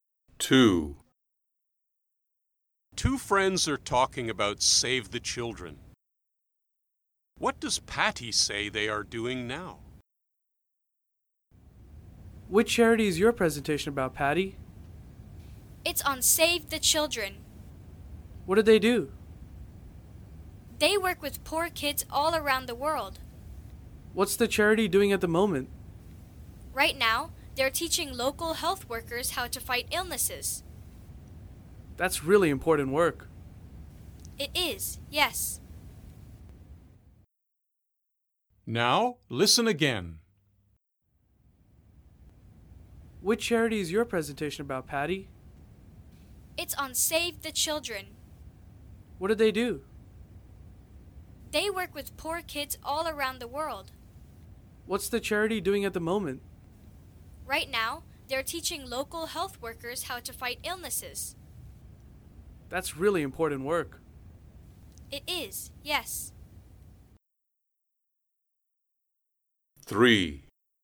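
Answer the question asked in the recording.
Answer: Teaching local health workers how to fight illnesses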